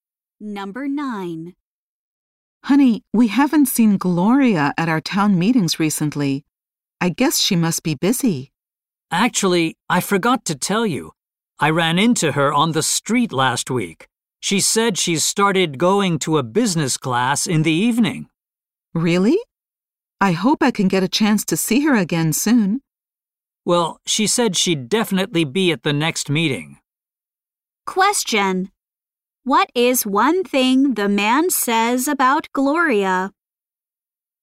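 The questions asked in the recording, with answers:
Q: What is one thing the man says about Gloria?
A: She has started taking a business class in the evening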